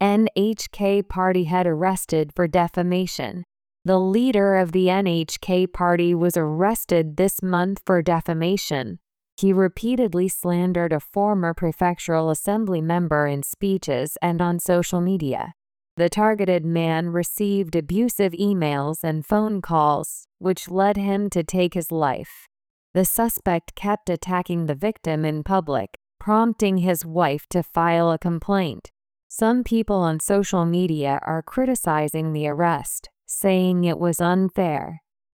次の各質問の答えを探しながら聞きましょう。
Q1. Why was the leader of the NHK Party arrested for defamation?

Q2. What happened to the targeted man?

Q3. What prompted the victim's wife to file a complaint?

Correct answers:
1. Because he repeatedly slandered a former prefectural assembly member in speeches and on social media.
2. He received abusive emails and phone calls, which led him to take his life.
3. The suspect kept attacking the man in public.

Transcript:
NHK Party Head Arrested for Defamation
The leader of the NHK Party was arrested this month for defamation.
He repeatedly slandered a former prefectural assembly member in speeches and on social media.
The targeted man received abusive emails and phone calls, which led him to take his life.
The suspect kept attacking the victim in public, prompting his wife to file a complaint.
Some people on social media are criticizing the arrest, saying it was unfair.